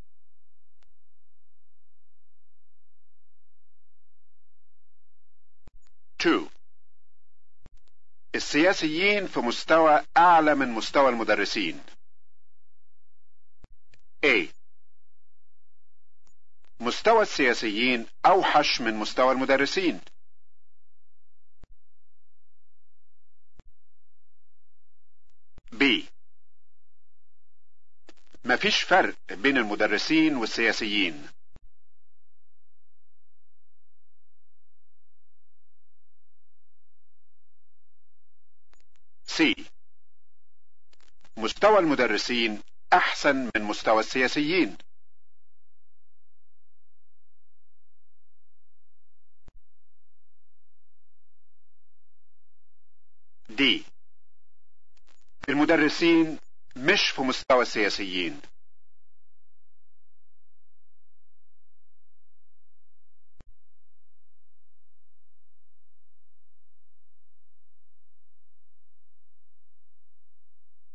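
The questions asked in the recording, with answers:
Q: السياسيين في مستوى أعلى من مستوى المدرسين.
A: D: المدرسين مش في مستوى السياسيين.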